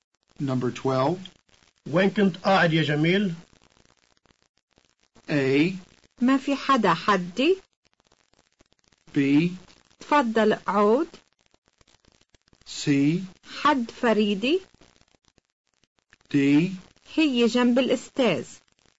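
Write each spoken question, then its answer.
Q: وين كنت قاعد يا جميل؟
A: C: حد فريدي.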